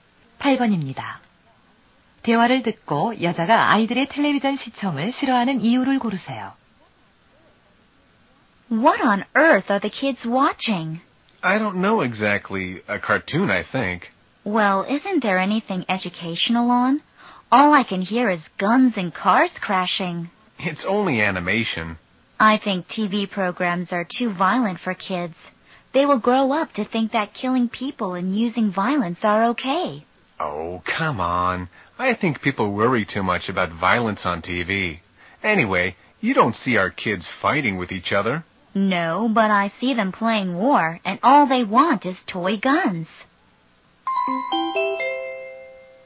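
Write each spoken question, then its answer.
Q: 대화를 듣고 여자가 아이들의 텔레비전 시청을 싫어하는 이유를 고르세요.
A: TV 프로그램이 너무 폭력적이어서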